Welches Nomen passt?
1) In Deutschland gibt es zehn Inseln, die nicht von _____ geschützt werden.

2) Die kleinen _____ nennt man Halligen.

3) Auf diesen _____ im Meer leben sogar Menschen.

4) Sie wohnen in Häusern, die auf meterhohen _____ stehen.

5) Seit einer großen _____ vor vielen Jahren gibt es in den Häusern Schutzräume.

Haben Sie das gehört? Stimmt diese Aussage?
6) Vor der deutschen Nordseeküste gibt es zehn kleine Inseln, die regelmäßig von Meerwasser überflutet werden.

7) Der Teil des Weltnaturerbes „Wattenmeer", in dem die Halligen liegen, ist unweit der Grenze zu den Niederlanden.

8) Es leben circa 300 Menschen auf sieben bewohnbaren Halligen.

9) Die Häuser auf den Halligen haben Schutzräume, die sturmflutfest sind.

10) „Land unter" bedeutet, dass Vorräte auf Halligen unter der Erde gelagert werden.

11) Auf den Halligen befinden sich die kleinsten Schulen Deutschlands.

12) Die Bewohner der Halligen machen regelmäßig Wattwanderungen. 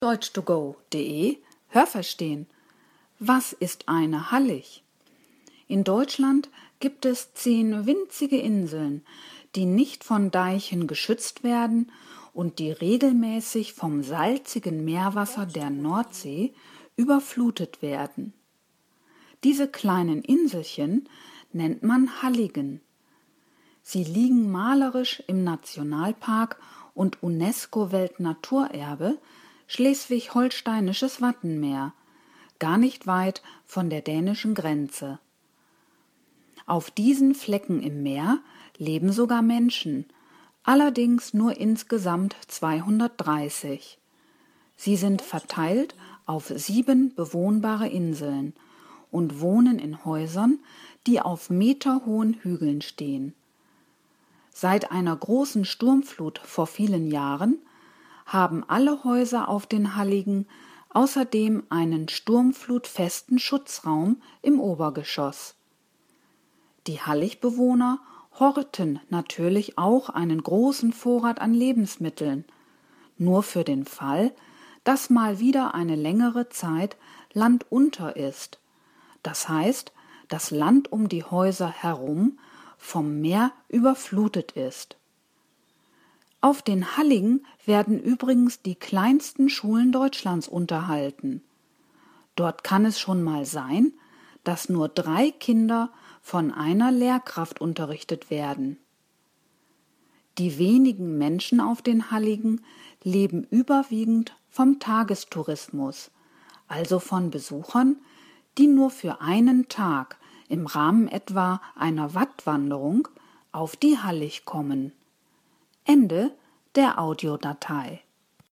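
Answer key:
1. Deichen
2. Inselchen
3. Flecken
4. Hügeln
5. Sturmflut
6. Richtig
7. Falsch
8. Falsch
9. Richtig
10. Falsch
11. Richtig
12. Falsch

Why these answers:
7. Dieser Teil ist nah an der dänischen Grenze.
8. Es sind nur 230 Menschen.
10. Es bedeutet, dass Land von Meerwasser überspült ist.
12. Sie leben größtenteils von Touristen, die auf Wattwanderungen die Halligen besuchen.

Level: Hörtexte C (schwer)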